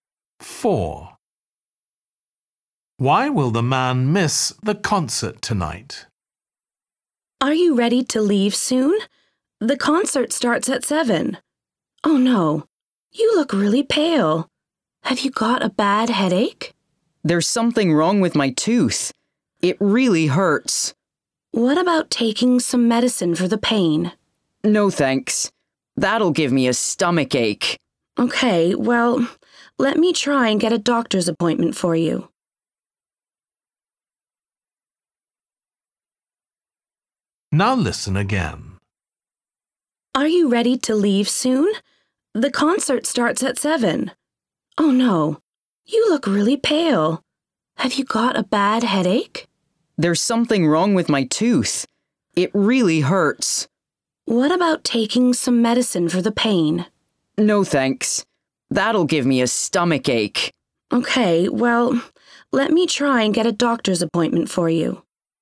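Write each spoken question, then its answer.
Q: Why will the man miss the concert tonight?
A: He has a toothache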